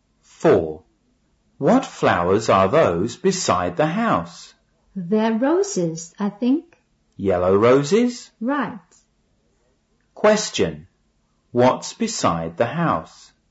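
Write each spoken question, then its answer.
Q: Question. What's beside the house?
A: Yellow roses.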